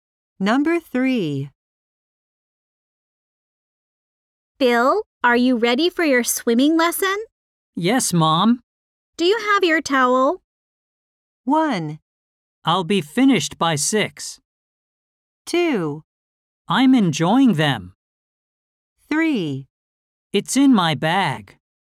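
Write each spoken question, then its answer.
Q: Do you have your towel?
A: 3: It's in my bag.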